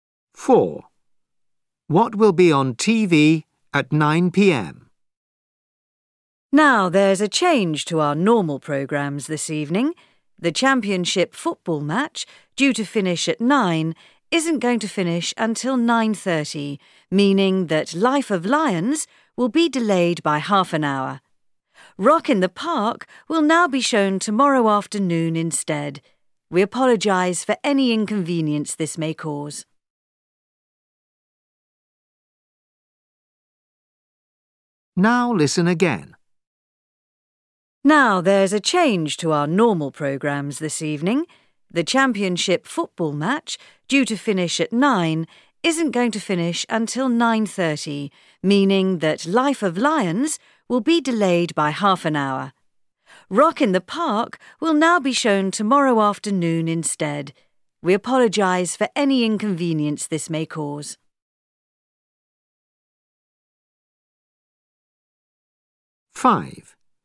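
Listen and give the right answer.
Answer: the championship football match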